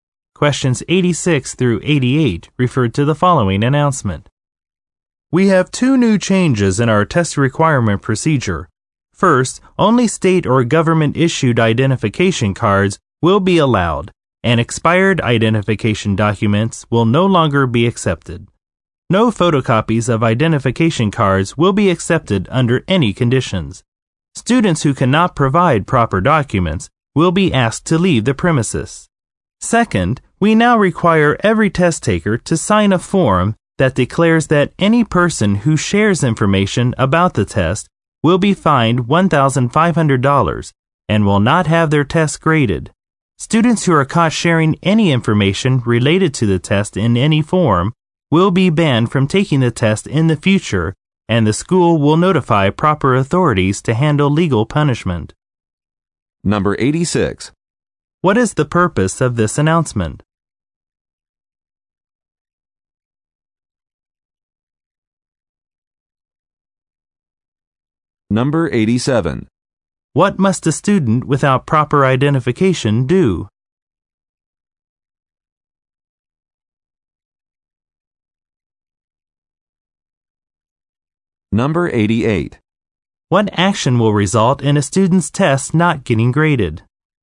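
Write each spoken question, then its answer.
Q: What is the purpose of this announcement?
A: To announce two new changes to test requirement procedures

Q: What must a student without proper identification do?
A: Leave the premises

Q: What action will result in a student's test not getting graded?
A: Sharing information about the test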